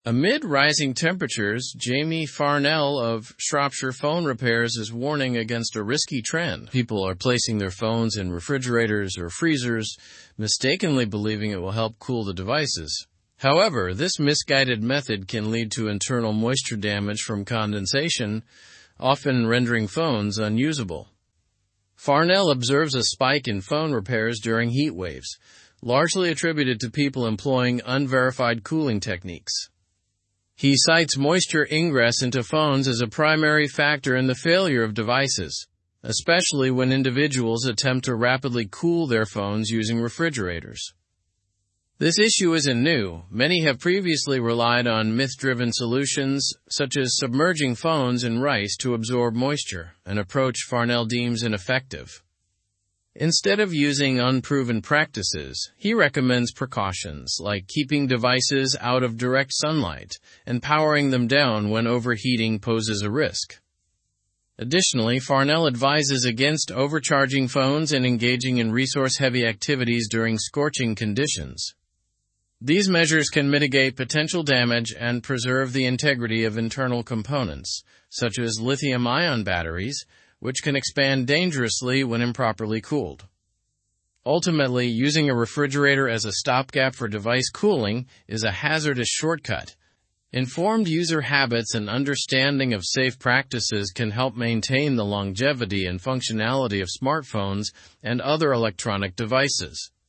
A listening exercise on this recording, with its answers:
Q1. What risky trend is Jamie Farnell warning about?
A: Placing phones in refrigerators or freezers to cool them.

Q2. What is often the outcome of using refrigerators for phone cooling?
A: Moisture damage, rendering phones unusable.

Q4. What ineffective solution have people previously relied on for moisture absorption?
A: Submerging phones in rice.

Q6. How can improper cooling affect lithium-ion batteries?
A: They can expand dangerously when improperly cooled.

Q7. What is the long-term benefit of avoiding hazardous shortcuts in device cooling?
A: Maintaining the longevity and functionality of smartphones.

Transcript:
Amid rising temperatures, Jamie Farnell of Shropshire Phone Repairs is warning against a risky trend. People are placing their phones in refrigerators or freezers, mistakenly believing it will help cool the devices. However, this misguided method can lead to internal moisture damage from condensation, often rendering phones unusable.
Farnell observes a spike in phone repairs during heatwaves, largely attributed to people employing unverified cooling techniques. He cites moisture ingress into phones as a primary factor in the failure of devices, especially when individuals attempt to rapidly cool their phones using refrigerators.
This issue isn't new. Many have previously relied on myth-driven solutions such as submerging phones in rice to absorb moisture—an approach Farnell deems ineffective. Instead of using unproven practices, he recommends precautions like keeping devices out of direct sunlight and powering them down when overheating poses a risk.
Additionally, Farnell advises against overcharging phones and engaging in resource-heavy activities during scorching conditions. These measures can mitigate potential damage and preserve the integrity of internal components, such as lithium-ion batteries, which can expand dangerously when improperly cooled.
Ultimately, using a refrigerator as a stopgap for device cooling is a hazardous shortcut. Informed user habits and understanding of safe practices can help maintain the longevity and functionality of smartphones and other electronic devices.

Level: Level 4